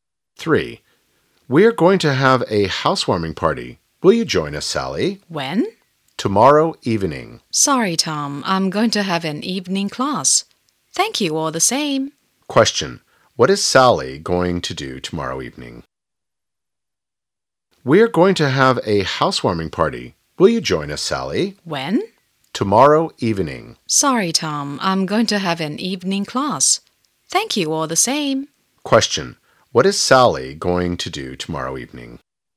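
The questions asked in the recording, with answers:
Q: What is Sally going to do tomorrow evening?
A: Have an evening class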